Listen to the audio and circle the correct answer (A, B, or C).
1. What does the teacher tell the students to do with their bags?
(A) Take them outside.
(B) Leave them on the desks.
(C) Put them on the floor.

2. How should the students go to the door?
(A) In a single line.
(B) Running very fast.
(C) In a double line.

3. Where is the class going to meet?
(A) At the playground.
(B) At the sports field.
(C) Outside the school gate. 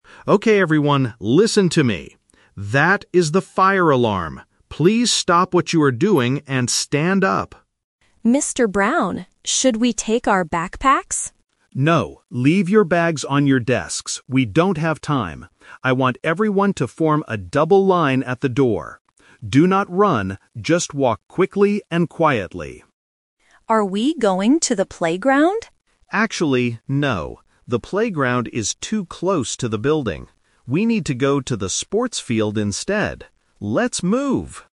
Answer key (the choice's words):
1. Leave them on the desks.
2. In a double line.
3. At the sports field.

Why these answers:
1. Emma asks if they should take their backpacks (Option A - Trap), but Mr. Brown explicitly says, "No, leave your bags on your desks." Option (C) is not mentioned.
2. The teacher instructs, "I want everyone to form a double line at the door." Option (B) is a trap because he specifically warns, "Do not run". Option (A) is plausible in real life but is incorrect based on the audio.
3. This is the "Twist". The student asks if they are going to the playground (Option A - Trap), but the teacher rejects this idea because it's too close to the building. He says, "We need to go to the sports field instead." Option (C) is not mentioned.

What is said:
Brown (Teacher): Okay everyone, listen to me! That is the fire alarm. Please stop what you are doing and stand up.
Student (Emma): Mr. Brown, should we take our backpacks?
Mr. Brown: No, leave your bags on your desks. We don't have time. I want everyone to form a double line at the door. Do not run, just walk quickly and quietly.
Student (Emma): Are we going to the playground?
Mr. Brown: Actually, no. The playground is too close to the building. We need to go to the sports field instead. Let's move!